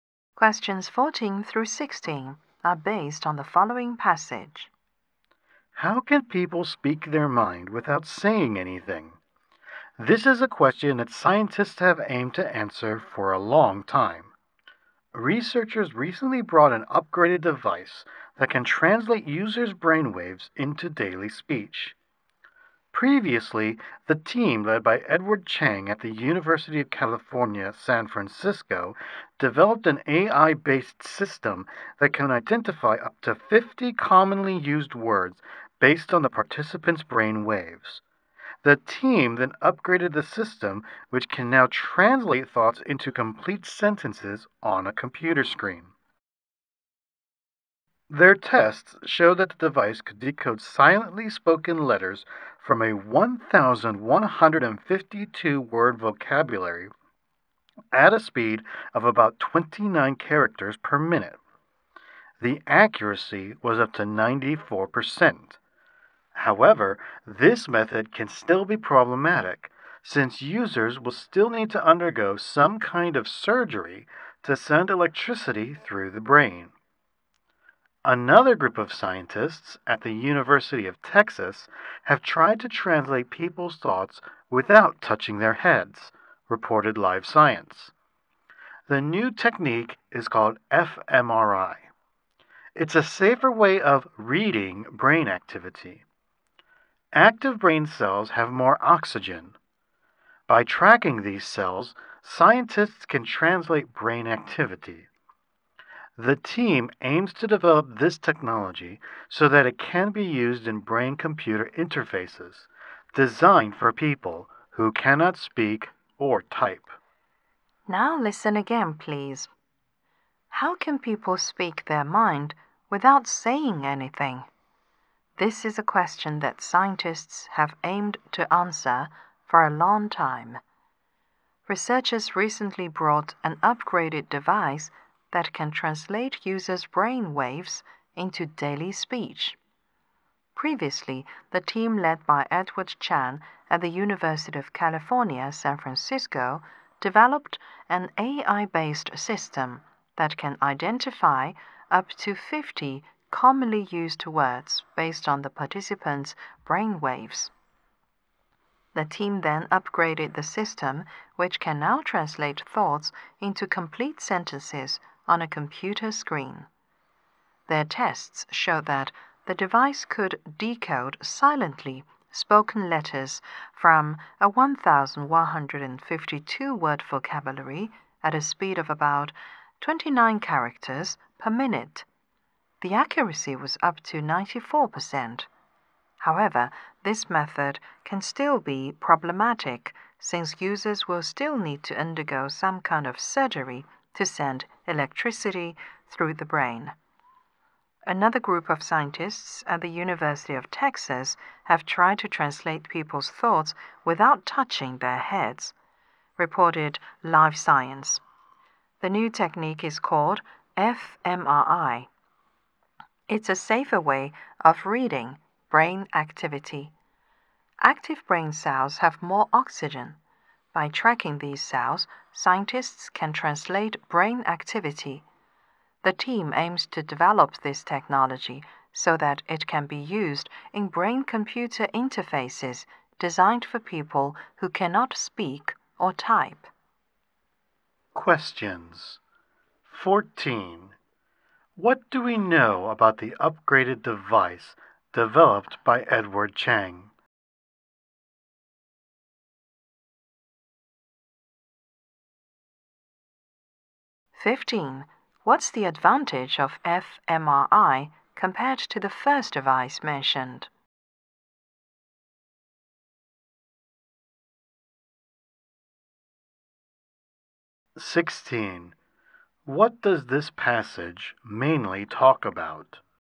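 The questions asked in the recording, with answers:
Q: What's the advantage of fMRI compared to the first device mentioned?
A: It needs no surgery; it is safer.

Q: What does this passage mainly talk about?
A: Devices that translate brain activity into speech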